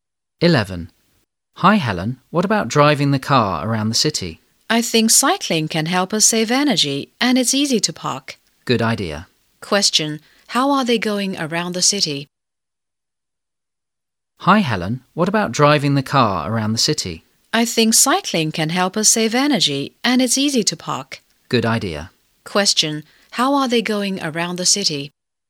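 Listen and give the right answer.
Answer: By bike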